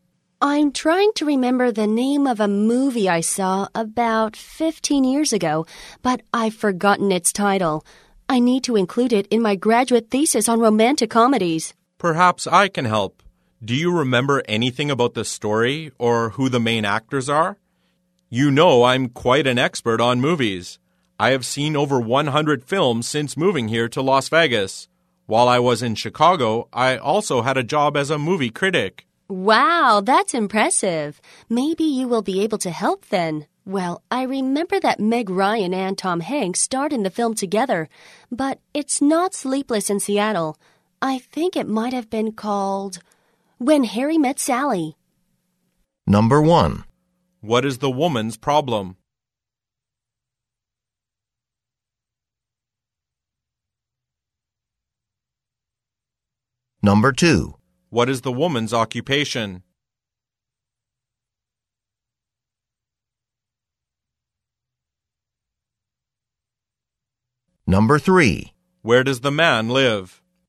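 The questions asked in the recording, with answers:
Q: What is the woman's problem?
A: She has forgotten the title of a movie she saw about 15 years ago.

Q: Where does the man live?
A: Las Vegas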